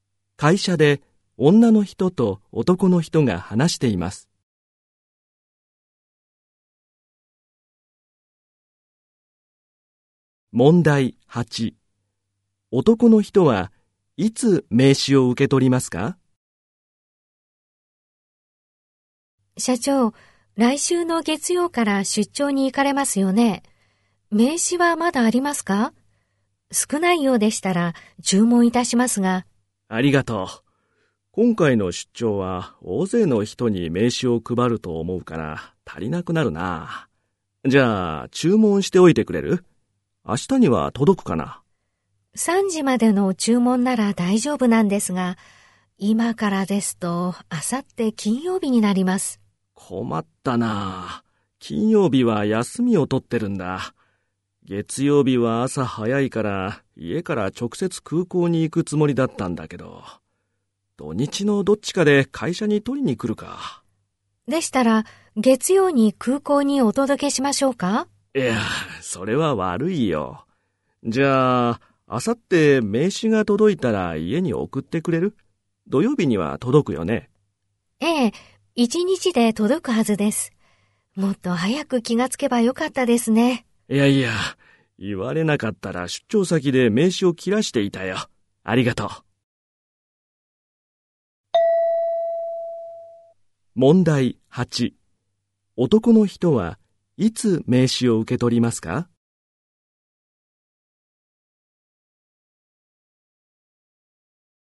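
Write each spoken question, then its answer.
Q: 男の人はいつ名刺を受け取りますか?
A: 土曜日(家で)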